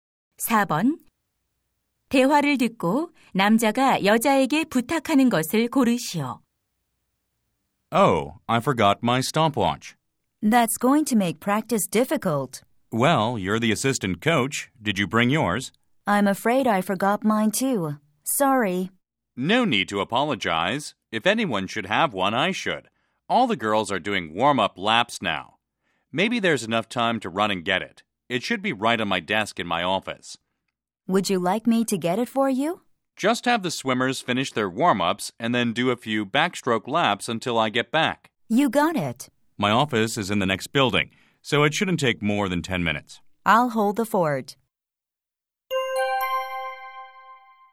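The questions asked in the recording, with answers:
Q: 대화를 듣고 남자가 여자에게 부탁하는 것을 고르시오.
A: 수영 선수들의 준비운동을 마치게 하고 배영 연습을 시키기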